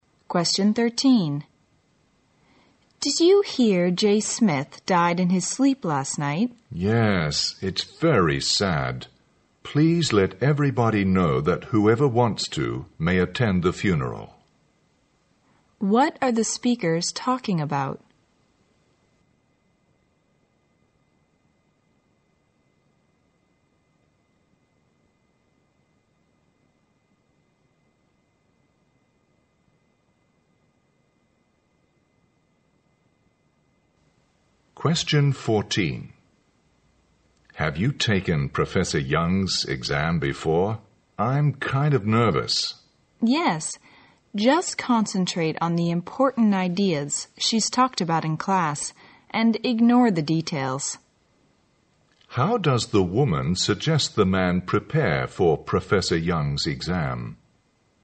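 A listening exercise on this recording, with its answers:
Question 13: What are the speakers talking about?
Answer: A sad occasion

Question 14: How does the woman suggest the man prepare for Professor Young's exam?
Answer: Focus on the main points of her lectures.

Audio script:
W: Did you hear Jay Smith died in his sleep last night?
M: Yes, it's very sad. Please let everybody know that whoever wants to, may attend the funeral.
Q: What are the speakers talking about?
M: Have you taken Professor Young's exam before? I'm kind of nervous.
W: Yes, just concentrate on the important ideas she's talked about in class and ignore the details.
Q: How does the woman suggest the man prepare for Professor Young's exam?

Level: 大学英语四级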